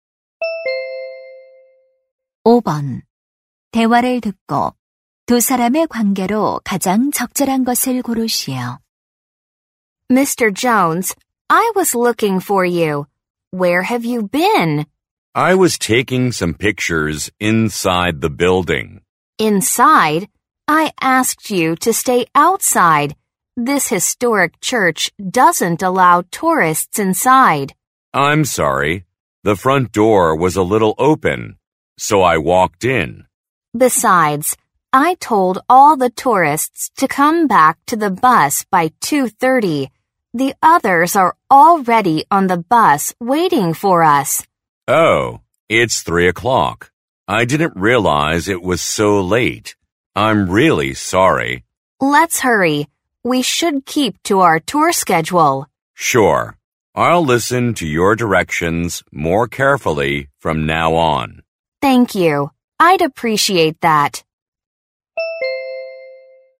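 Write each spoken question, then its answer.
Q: 대화를 듣고 두 사람의 관계로 가장 적절한 것을 고르시오.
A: 여행 가이드 — 관광객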